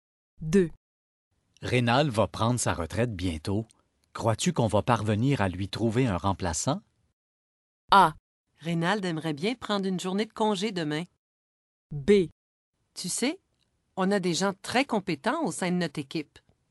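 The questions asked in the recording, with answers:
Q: Crois-tu qu'on va parvenir à lui trouver un remplaçant?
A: B: Tu sais, on a des gens très compétents au sein de notre équipe.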